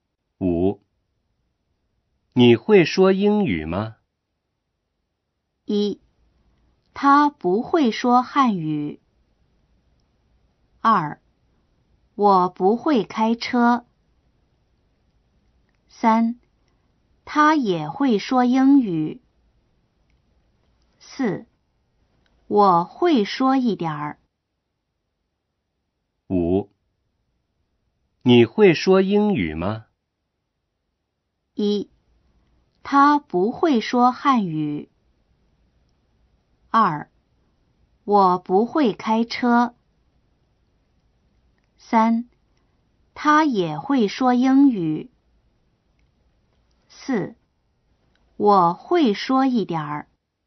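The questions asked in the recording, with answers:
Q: 你会说英语吗?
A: 4: 我会说一点儿。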